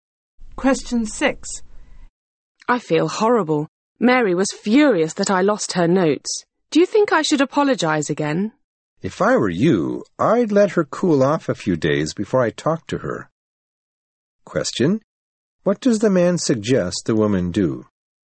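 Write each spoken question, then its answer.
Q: Question. What does the man suggest the woman do?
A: Wait a few days before talking to Mary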